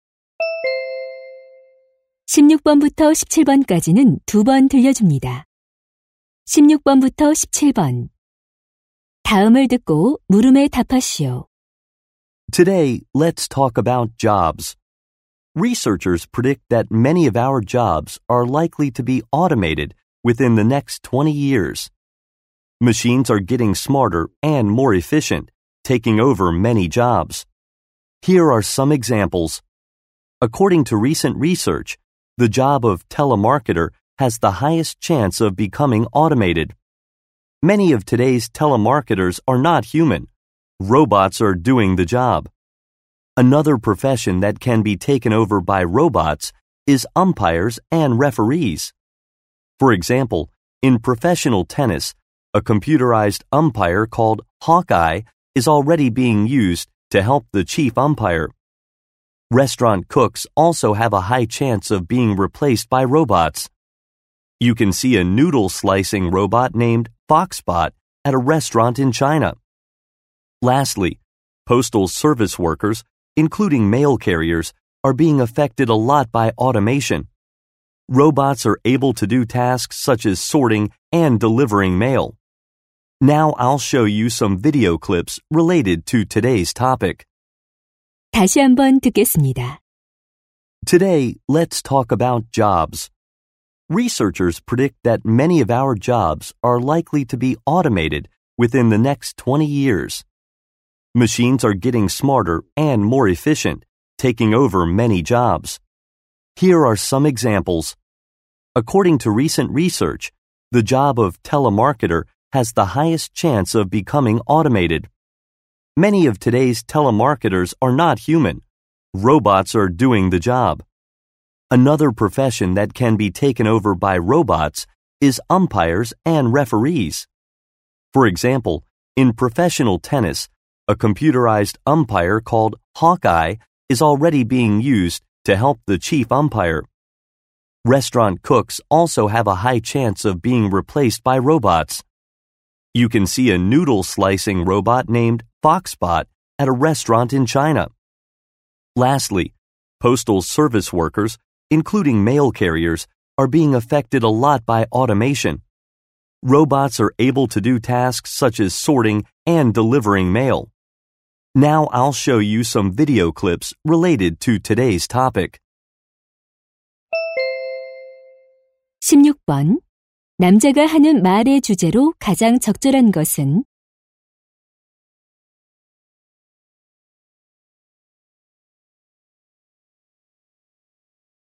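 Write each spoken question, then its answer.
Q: 남자가 하는 말의 주제로 가장 적절한 것은?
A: 자동화로 인해 로봇에게 대체될 가능성이 높은 직업들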